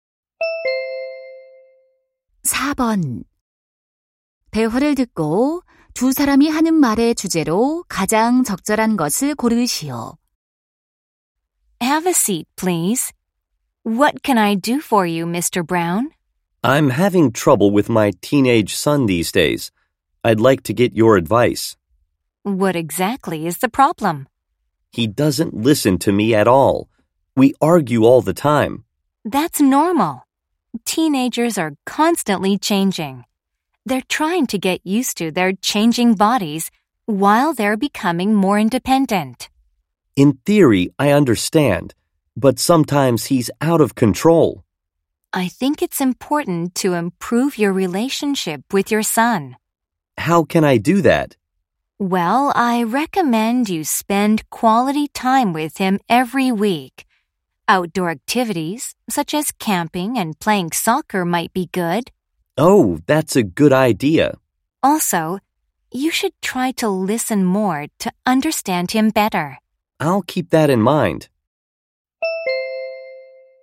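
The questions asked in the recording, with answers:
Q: 대화를 듣고 두 사람이 하는 말의 주제로 가장 적절한 것을 고르시오.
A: 십대 아들과의 관계 개선 방법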